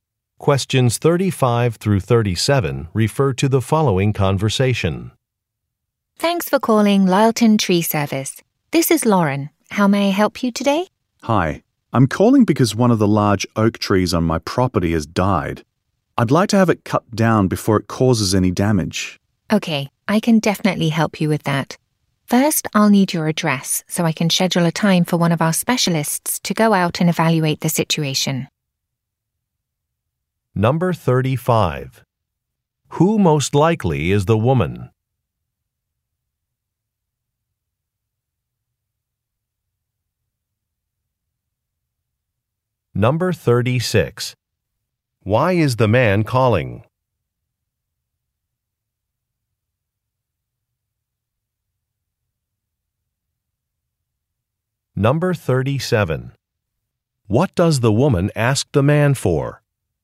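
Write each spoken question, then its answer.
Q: Who most likely is the woman?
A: An employee of a tree service company

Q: Why is the man calling?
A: To have a dead oak tree cut down

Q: What does the woman ask the man for?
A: His address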